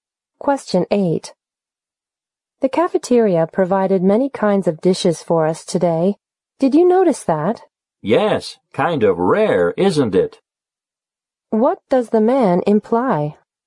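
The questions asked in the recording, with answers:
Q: What does the man imply?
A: The cafeteria seldom offers so many kinds of dishes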